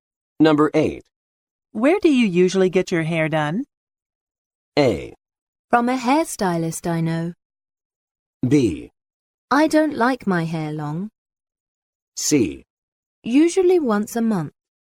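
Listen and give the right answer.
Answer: A: From a hairstylist I know.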